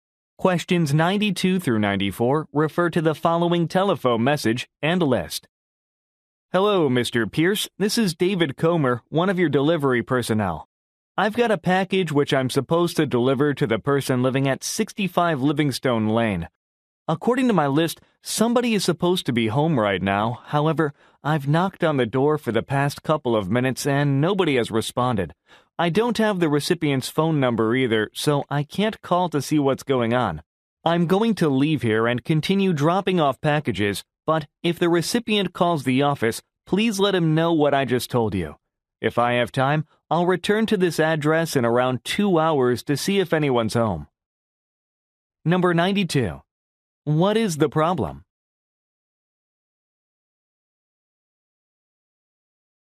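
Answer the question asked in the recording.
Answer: Nobody is home to receive the package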